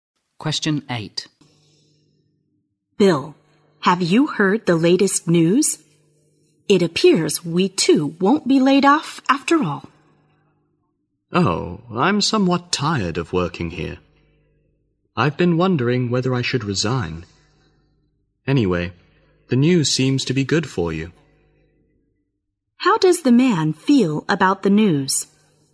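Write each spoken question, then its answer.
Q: How does the man feel about the news?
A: Indifferent; he is thinking of resigning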